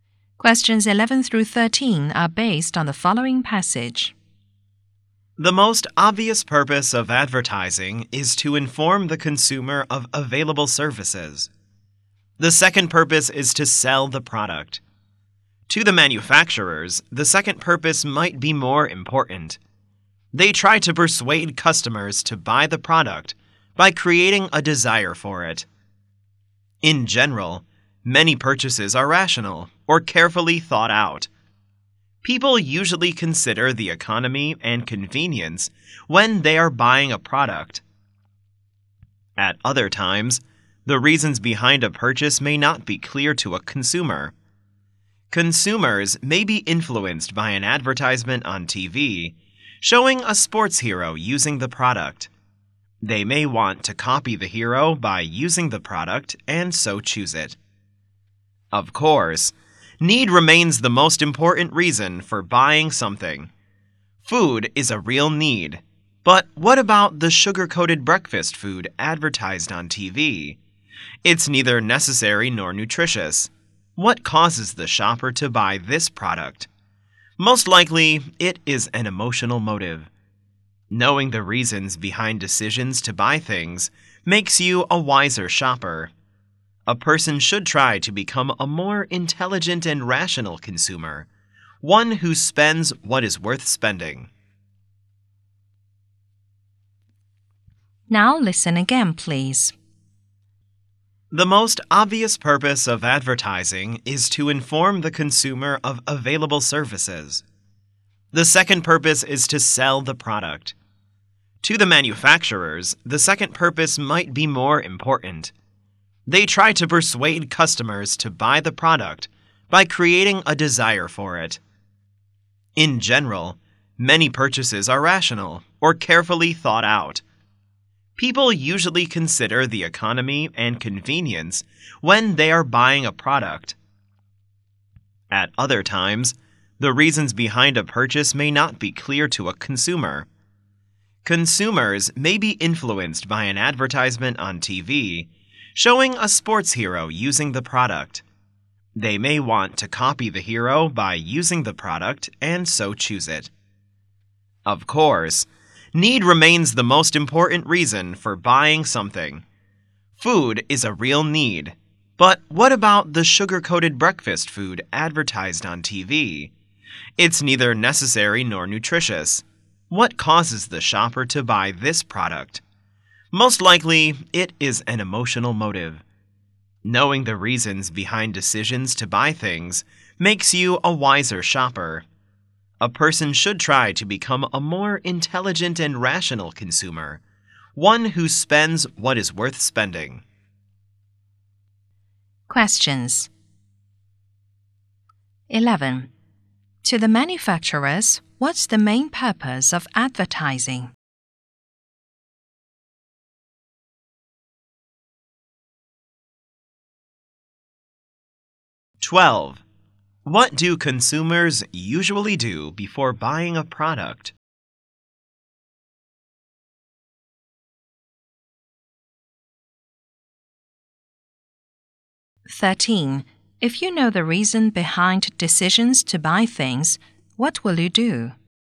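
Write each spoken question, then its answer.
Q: To the manufacturers, what's the main purpose of advertising?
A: To sell the product

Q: What do consumers usually do before buying a product?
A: Consider economy and convenience

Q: If you know the reason behind decisions to buy things, what will you do?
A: Become a wiser shopper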